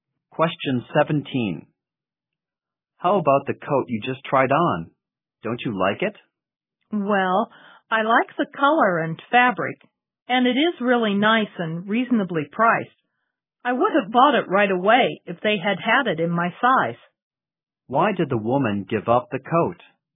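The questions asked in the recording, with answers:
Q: Why did the woman give up the coat?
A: They didn't have it in her size.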